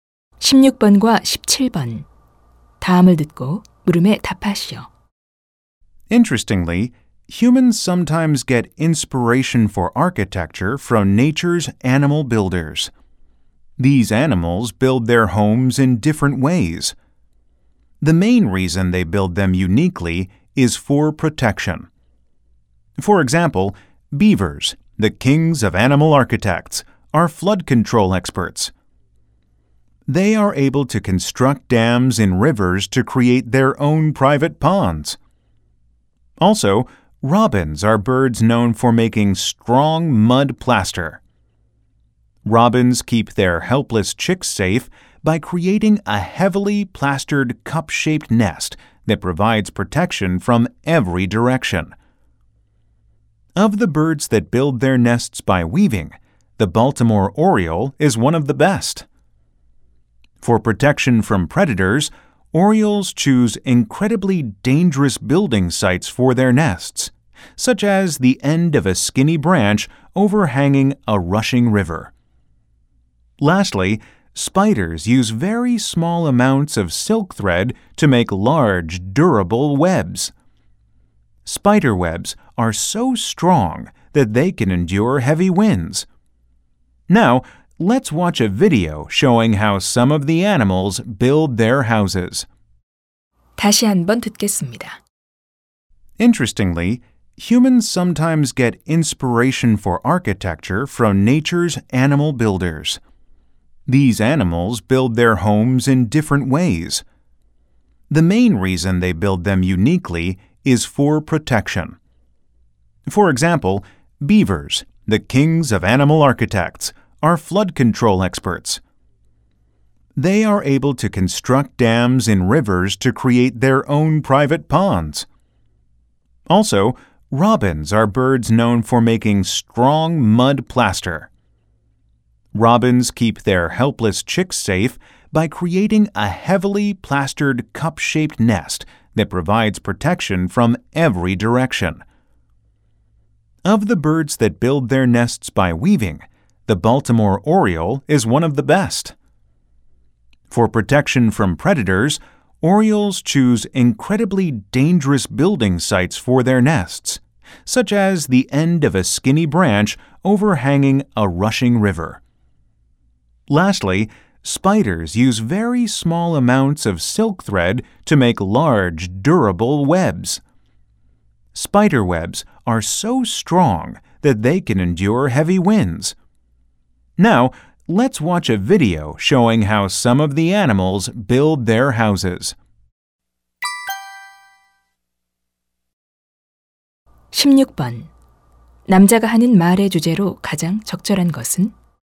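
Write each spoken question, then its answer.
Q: 남자가 하는 말의 주제로 가장 적절한 것은?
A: 동물들이 보호를 위해 독특하게 집을 짓는 방식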